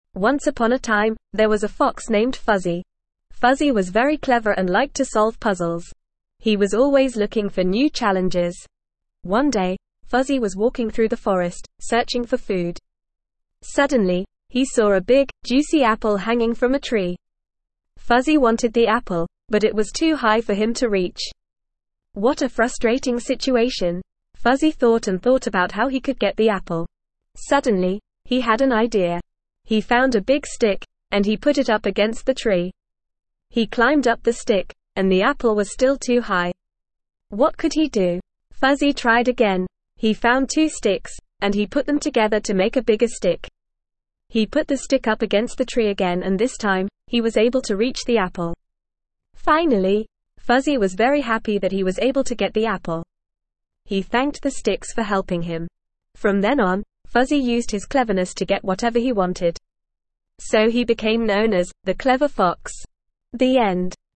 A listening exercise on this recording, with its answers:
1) What was the name of the fox?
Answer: Fuzzy

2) What was Fuzzy always looking for?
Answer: New challenges

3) What did Fuzzy find hanging from a tree?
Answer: A big, juicy apple

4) What did Fuzzy do to try and get the apple?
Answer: He found a stick and tried to reach the apple

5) How many sticks did Fuzzy use to get the apple?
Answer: Two

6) How did Fuzzy make the sticks longer?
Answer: He put them together to make a bigger stick

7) What was Fuzzy able to do with the help of the sticks?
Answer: Reach the apple

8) How did Fuzzy feel when he got the apple?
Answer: Very happy

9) What did Fuzzy thank the sticks for?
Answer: Helping him

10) What did Fuzzy use his cleverness to do afterwards?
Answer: Get whatever he wanted

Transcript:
Once upon a time, there was a fox named Fuzzy. Fuzzy was very clever and liked to solve puzzles. He was always looking for new challenges.
One day, Fuzzy was walking through the forest, searching for food. Suddenly, he saw a big, juicy apple hanging from a tree. Fuzzy wanted the apple, but it was too high for him to reach. What a frustrating situation!
Fuzzy thought and thought about how he could get the apple. Suddenly, he had an idea. He found a big stick, and he put it up against the tree. He climbed up the stick, and the apple was still too high. What could he do?
Fuzzy tried again. He found two sticks, and he put them together to make a bigger stick. He put the stick up against the tree again and this time, he was able to reach the apple. Finally!
Fuzzy was very happy that he was able to get the apple. He thanked the sticks for helping him. From then on, Fuzzy used his cleverness to get whatever he wanted. So he became known as "The Clever Fox".
The End.

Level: Level 2